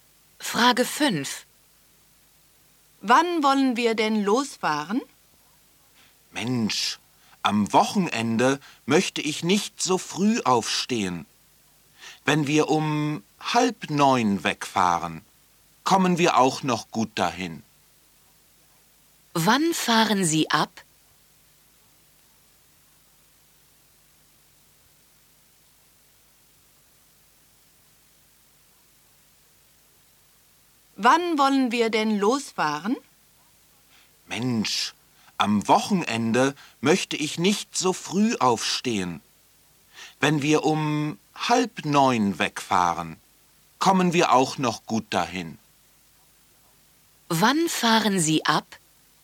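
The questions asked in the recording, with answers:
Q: Wann fahren Sie ab?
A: Um 8:30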